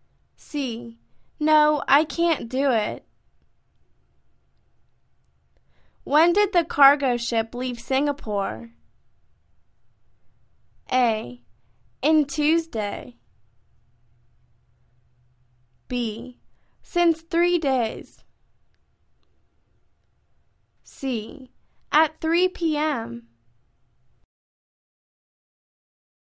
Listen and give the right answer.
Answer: At 3 p.m.